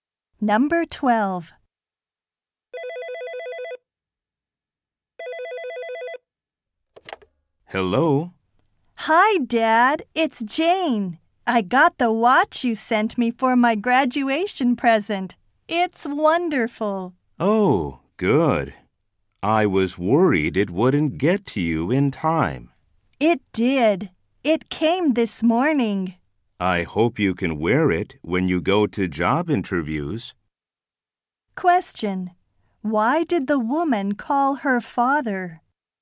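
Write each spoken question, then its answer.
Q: Why did the woman call her father?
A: To thank him for the watch he sent as a graduation present.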